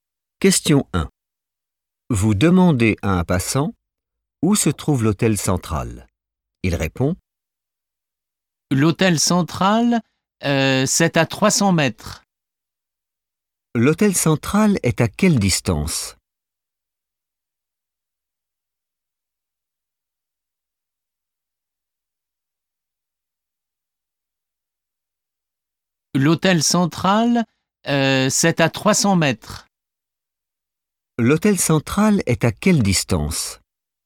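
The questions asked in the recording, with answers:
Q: L'hôtel central est à quelle distance?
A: 300 mètres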